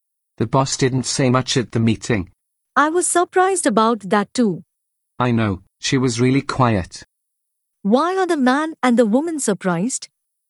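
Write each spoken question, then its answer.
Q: Why are the man and the woman surprised?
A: The boss didn't say much at the meeting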